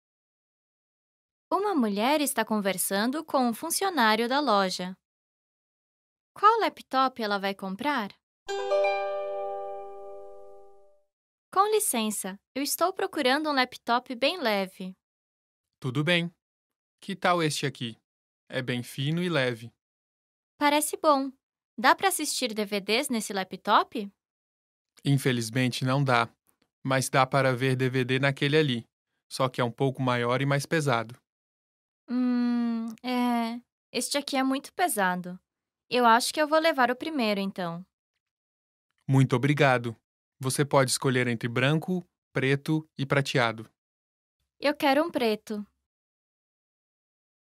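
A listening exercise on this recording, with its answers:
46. De qual cor o laptop a mulher vai escolher?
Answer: Preto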